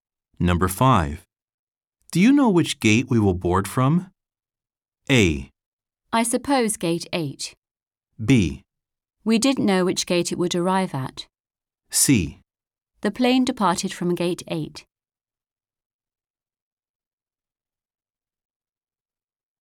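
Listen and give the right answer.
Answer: A: I suppose gate 8.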